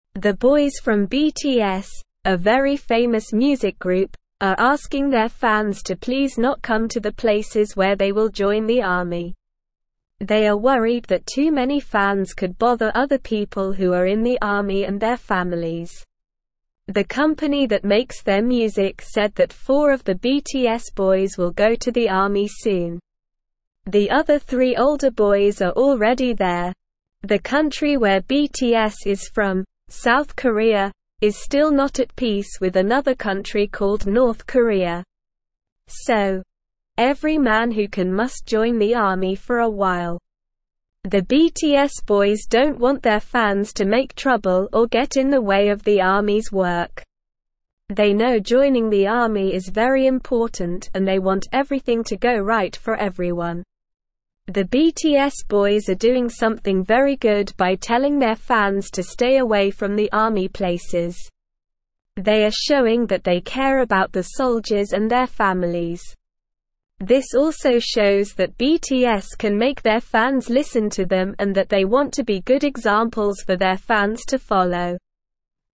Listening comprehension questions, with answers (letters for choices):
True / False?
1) The members of BTS are asking their fans not to visit the places where they will join the army.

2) BTS wants their fans to visit the army places to cause trouble or get in the way of the army's work.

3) None of the older members of BTS are already serving in the army.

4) Every man in South Korea who is unable must join the army for a period of time.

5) BTS's decision to ask their fans to stay away from the army places shows that they care about the soldiers and their families.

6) The company that produces BTS's music has announced that four of the members will soon join the army.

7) South Korea is no longer in conflict with another country called North Korea.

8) BTS is a famous music group from South Korea.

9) The boys from BTS, a very famous (1)______ group, are asking their fans to please not come to the places where they will join the army.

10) They are worried that too (2)______ fans could b(3)______ other people who are in the army and their families.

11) The other three (4)______ boys are already there.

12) The (5)______ where BTS is from, (6)______ Korea, is still not at peace with another country called North Korea.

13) The BTS (7)______ don't want their fans to make (8)______ or get in the way of the army's (9)______.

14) The BTS (7)______ don't want their fans to make (8)______ or get in the way of the army's (9)______.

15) The BTS (7)______ don't want their fans to make (8)______ or get in the way of the army's (9)______.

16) The BTS boys are doing something very good by (10)______ their fans to stay away from the army places.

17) This also shows that BTS can (11)______ their fans listen to them and that they want to be (12)______ examples for their fans to follow.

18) This also shows that BTS can (11)______ their fans listen to them and that they want to be (12)______ examples for their fans to follow.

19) Who are the boys from BTS asking to stay away from the army places?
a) Other soldiers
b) Their families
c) The company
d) Their fans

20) How many BTS boys will go to the army soon?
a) Four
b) Three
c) Two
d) One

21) Where is BTS from?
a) South Korea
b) North Korea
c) France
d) Japan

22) Why do men in South Korea join the army?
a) Because they want to be like BTS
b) Because they have to do a job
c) Because the country is not at peace with North Korea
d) Because they like the army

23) What do the BTS boys want to happen for everyone?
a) Everything to go wrong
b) Everyone to join the army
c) Everything to go right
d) Everyone to stay away from the army places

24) What are the BTS boys showing by telling their fans to stay away from the army places?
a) That they don't care about the soldiers and their families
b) That they want their fans to join the army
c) That they want their fans to make trouble for the army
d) That they care about the soldiers and their families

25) Who is asking their fans not to come to the army places?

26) What country is South Korea still not at peace with?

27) Why do men in South Korea have to join the army?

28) What do the BTS boys want to happen for everyone in the army?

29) What is the BTS boys showing by telling their fans to stay away from the army places?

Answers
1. True
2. False
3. False
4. False
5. True
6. True
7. False
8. True
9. music
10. many
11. older
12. South
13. boys
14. trouble
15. work
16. telling
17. make
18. good
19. d
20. a
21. a
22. c
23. c
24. d
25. The BTS boys are asking their fans not to come to the army places.
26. South Korea is still not at peace with North Korea.
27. Men in South Korea have to join the army because it is a requirement for every man who can join.
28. The BTS boys want everything to go right for everyone in the army.
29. The BTS boys are showing that they care about the soldiers and their families.

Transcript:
The boys from BTS, a very famous music group, are asking their fans to please not come to the places where they will join the army. They are worried that too many fans could bother other people who are in the army and their families. The company that makes their music said that four of the BTS boys will go to the army soon. The other three older boys are already there.
The country where BTS is from, South Korea, is still not at peace with another country called North Korea. So, every man who can must join the army for a while. The BTS boys don't want their fans to make trouble or get in the way of the army's work. They know joining the army is very important and they want everything to go right for everyone.
The BTS boys are doing something very good by telling their fans to stay away from the army places. They are showing that they care about the soldiers and their families. This also shows that BTS can make their fans listen to them and that they want to be good examples for their fans to follow.

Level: Level 2